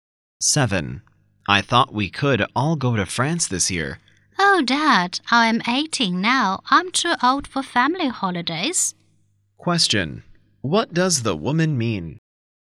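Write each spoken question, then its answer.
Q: What does the woman mean?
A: She doesn't want to go on a family holiday.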